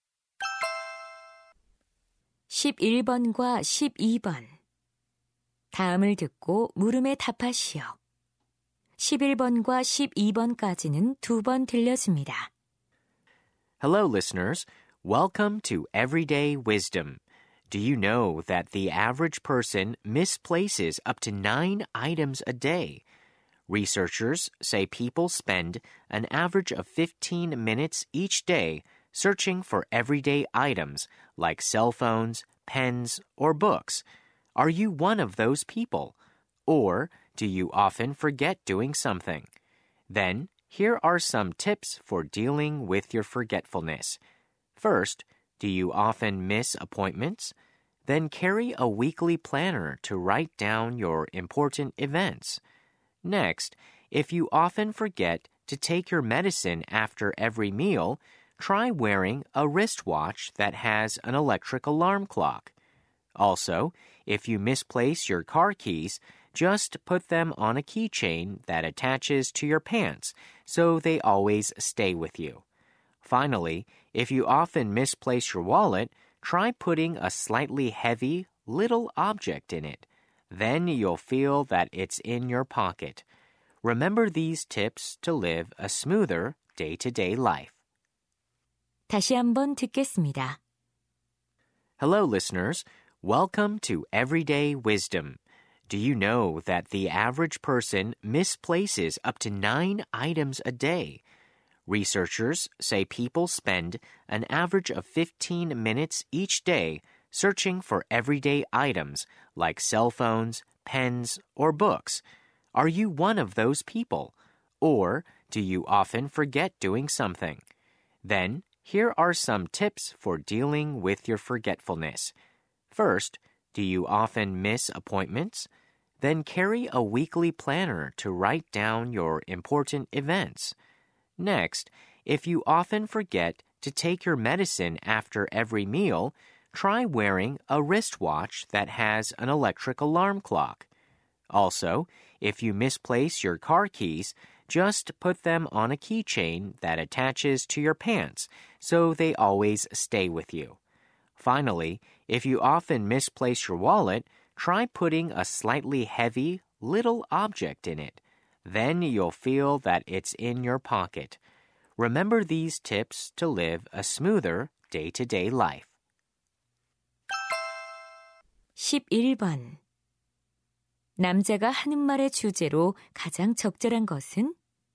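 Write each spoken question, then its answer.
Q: 남자가 하는 말의 주제로 가장 적절한 것은?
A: 건망증에 대처하는 요령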